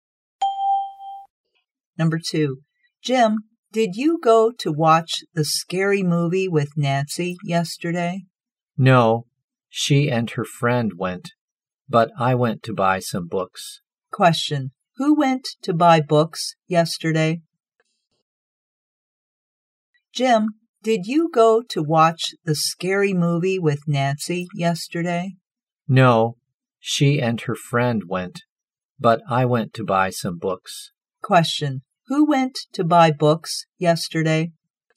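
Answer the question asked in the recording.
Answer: Jim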